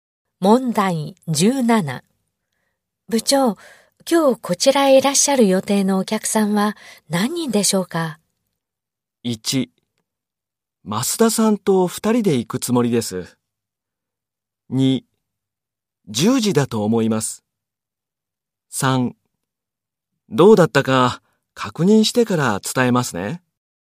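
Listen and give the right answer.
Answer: 3: どうだったか確認してから伝えますね。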